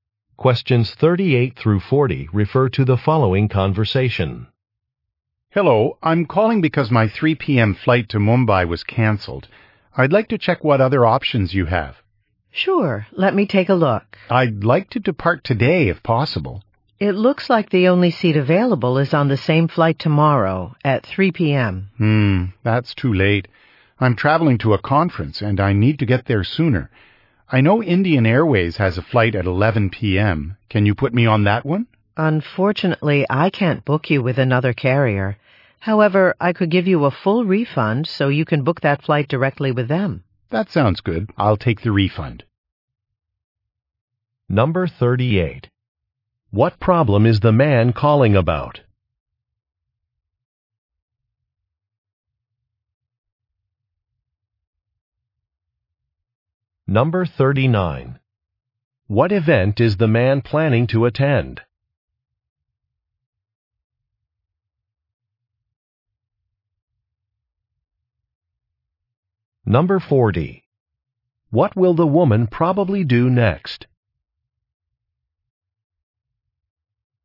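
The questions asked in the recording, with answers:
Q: What problem is the man calling about?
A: His flight was canceled

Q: What event is the man planning to attend?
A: A conference

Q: What will the woman probably do next?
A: Give the man a full refund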